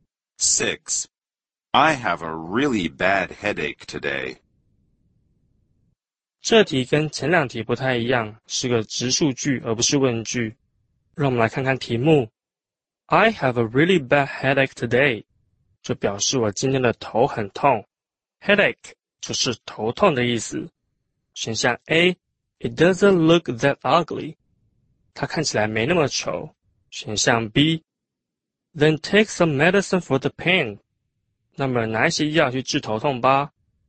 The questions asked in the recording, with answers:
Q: I have a really bad headache today.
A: 只有答案 B 符合,所以我们选 B。